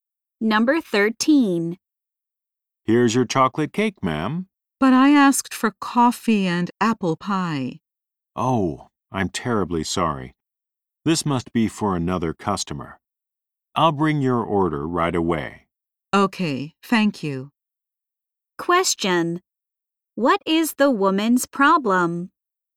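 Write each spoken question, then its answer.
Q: What is the woman's problem?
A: She got the wrong order.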